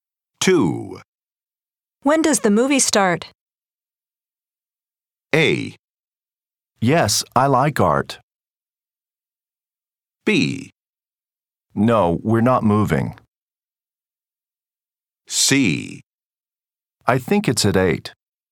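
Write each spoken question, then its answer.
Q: When does the movie start?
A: C: I think it's at 8.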